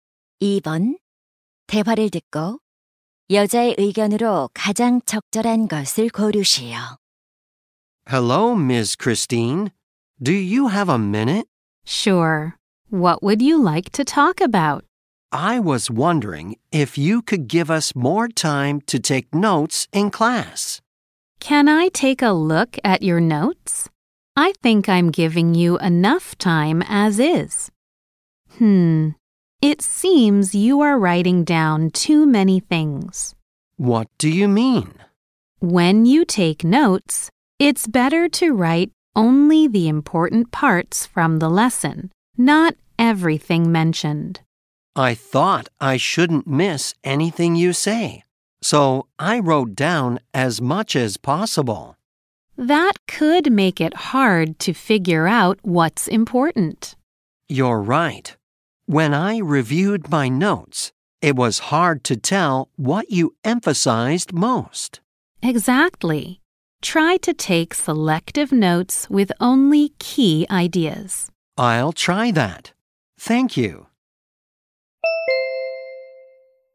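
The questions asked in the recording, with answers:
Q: 대화를 듣고 여자의 의견으로 가장 적절한 것을 고르시오.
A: 필기할 때는 핵심 내용만 선별해서 적어야 한다.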